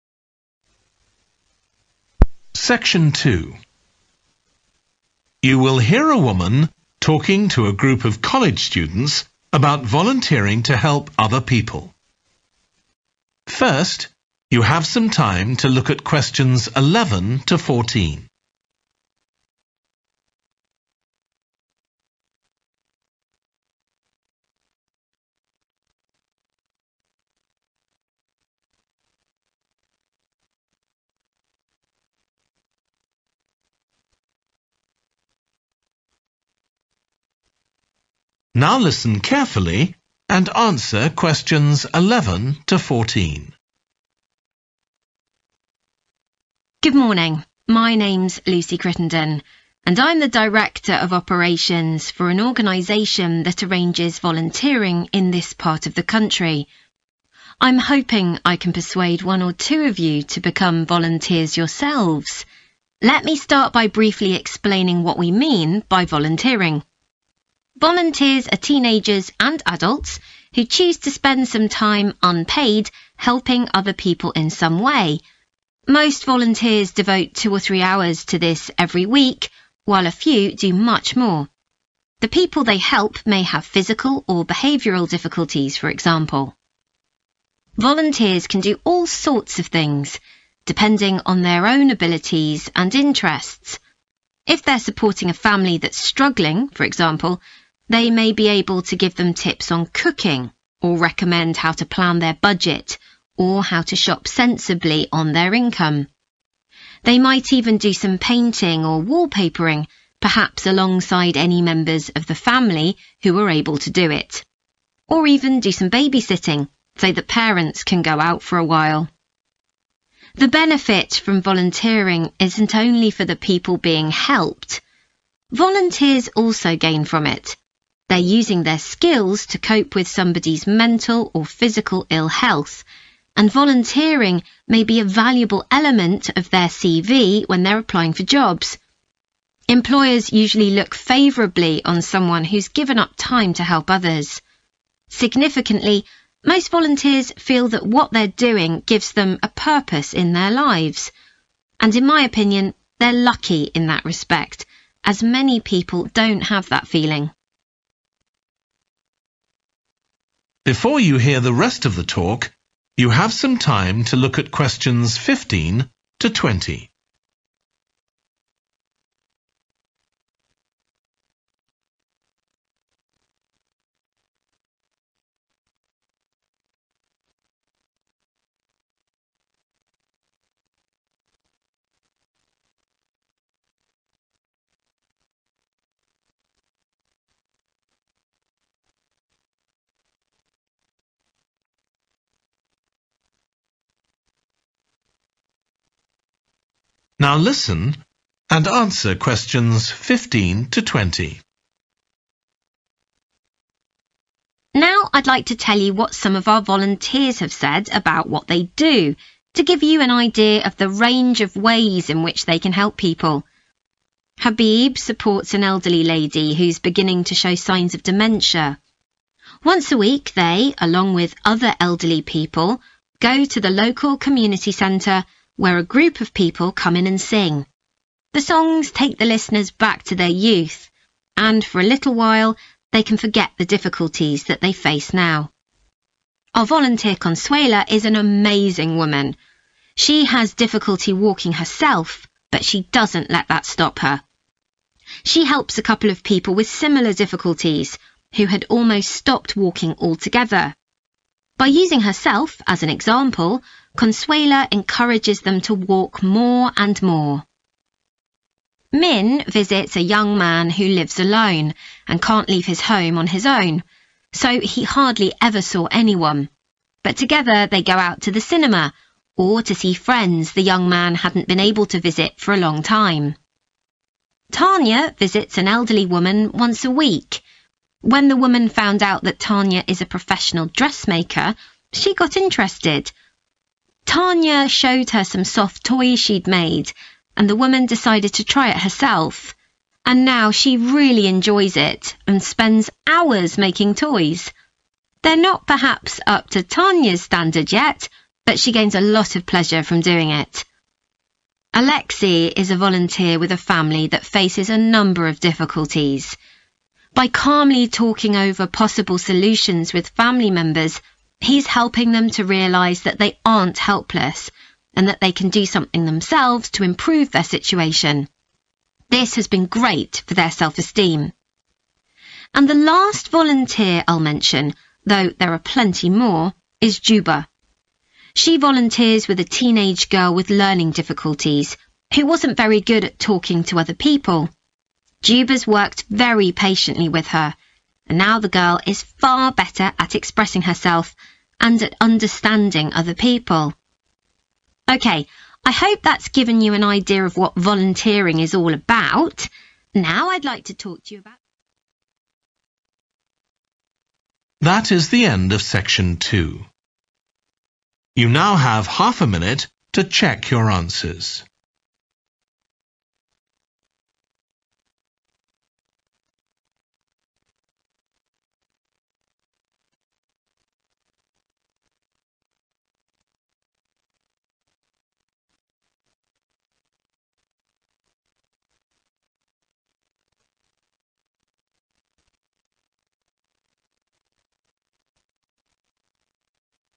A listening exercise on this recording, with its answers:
Choose TWO letters, A-E. Which TWO activities that volunteers do are mentioned?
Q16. Consuela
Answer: A. overcome physical difficulties

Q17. Minh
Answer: E. escape isolation

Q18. Tanya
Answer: G. start a new hobby

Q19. Alexei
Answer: D. solve problems independently

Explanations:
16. She has difficulty walking herself, but she doesn't let that stop her (= overcome physical difficulties) [Cô ấy gặp khó khăn trong việc tự di chuyển, nhưng cô ấy không để điều đó ngăn cản mình].
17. But together they go out to the cinema, or to see friends (= escape isolation) [Nhưng cùng nhau họ đi xem phim, hoặc gặp gỡ bạn bè]
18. Tanya showed her some soft toys she'd made, and the woman decided to try it herself. And now she really enjoys it, and spends hours making toys. (= start a new hobby) [Tanya cho bà ấy xem một số đồ chơi mềm mà cô đã làm, và người phụ nữ kia quyết định tự mình thử. Bây giờ bà ấy thực sự thích nó, và dành hàng giờ để làm đồ chơi.]
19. and that they can do something themselves to improve their situation (= solve problems independently) [họ có thể tự làm điều gì đó để cải thiện tình hình của mình].